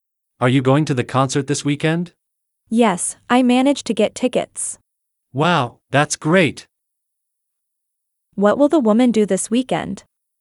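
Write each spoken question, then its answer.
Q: What will the woman do this weekend?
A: go to the concert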